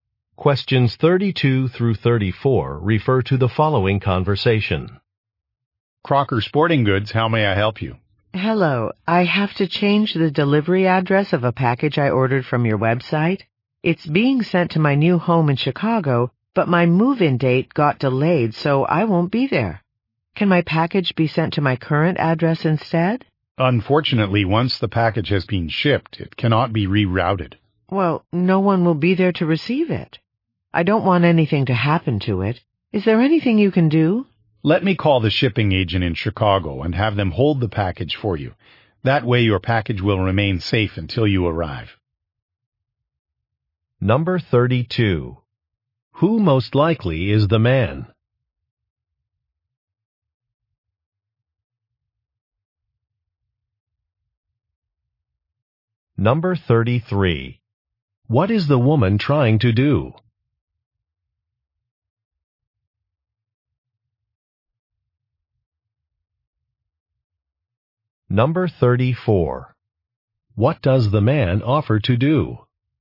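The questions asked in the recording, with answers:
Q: Who most likely is the man?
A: An employee at a sporting goods store

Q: What is the woman trying to do?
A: Change the delivery address of a package

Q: What does the man offer to do?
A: Call the shipping agent to hold the package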